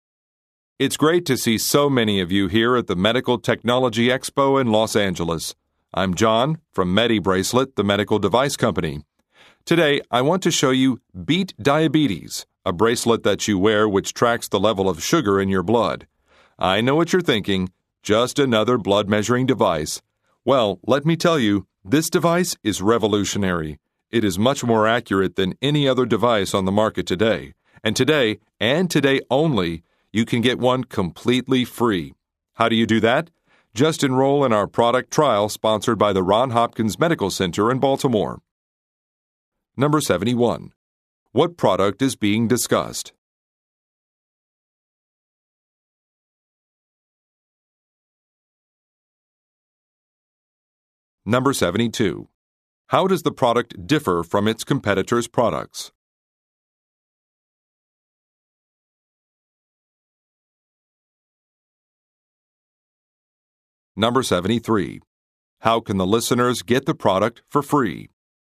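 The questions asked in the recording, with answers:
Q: What product is being discussed?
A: A bracelet that tracks blood sugar levels

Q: How does the product differ from its competitors' products?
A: It is more accurate

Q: How can the listeners get the product for free?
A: By enrolling in a product trial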